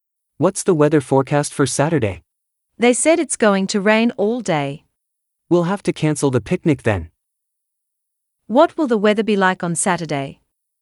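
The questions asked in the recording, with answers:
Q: What will the weather be like on Saturday?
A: Rainy all day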